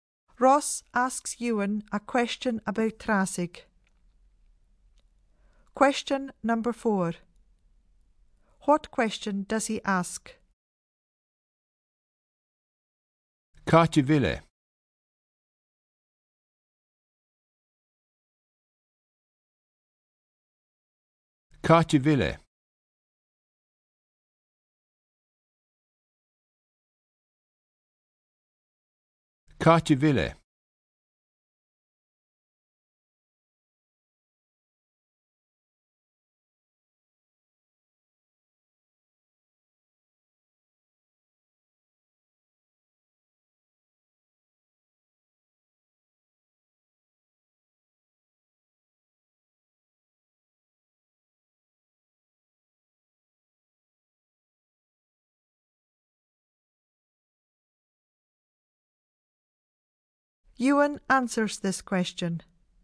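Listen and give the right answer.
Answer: Where is it?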